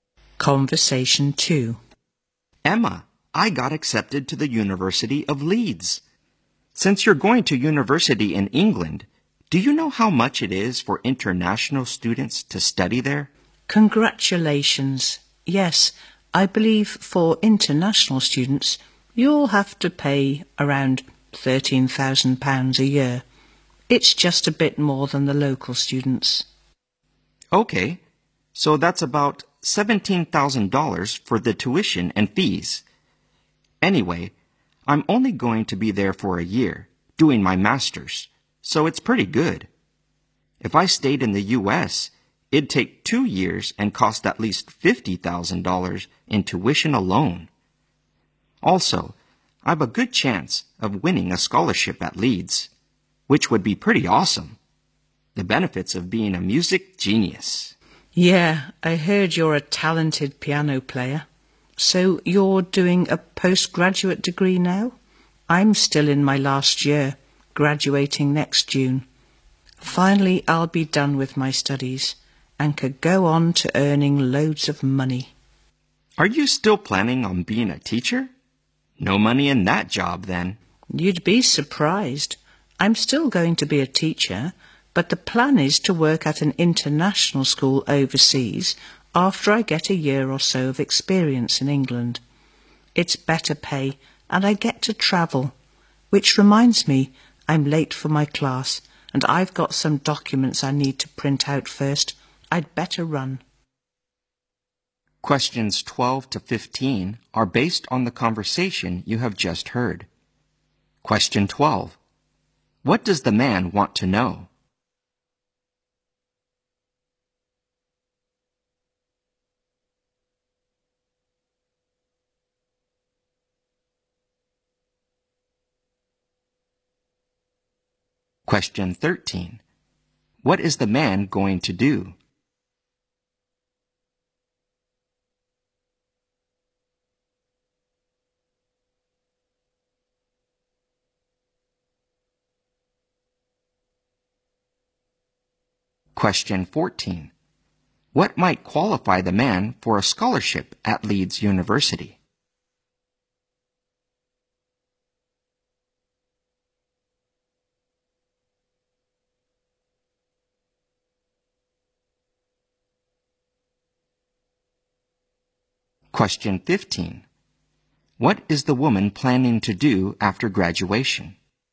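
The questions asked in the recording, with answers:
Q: What does the man want to know?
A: How much it costs for international students to study in England.

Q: What is the man going to do?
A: Do a one-year master's degree at the University of Leeds.

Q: What might qualify the man for a scholarship at Leeds University?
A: His musical talent.

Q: What is the woman planning to do after graduation?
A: Be a teacher, gain experience in England, and then teach at an international school overseas.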